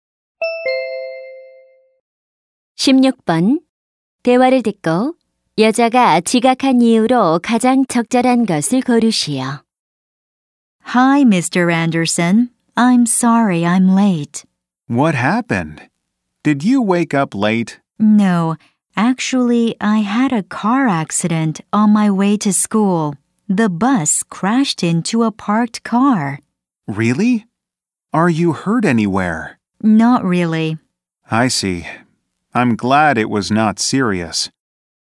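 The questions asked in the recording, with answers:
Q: 대화를 듣고 여자가 지각한 이유로 가장 적절한 것을 고르시오.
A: 등굣길에 버스 사고가 나서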